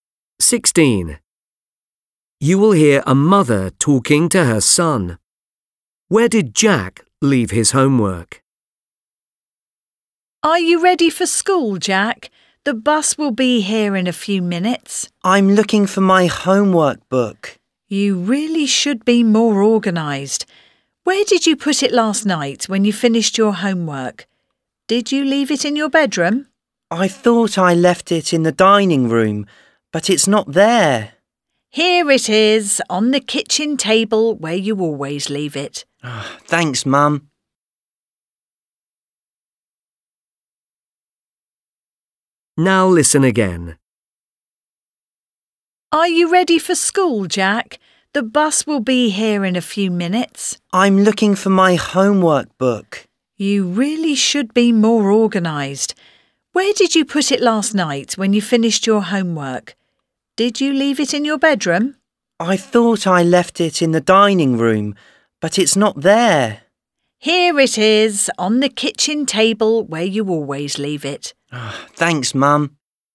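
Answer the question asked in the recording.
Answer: on the kitchen table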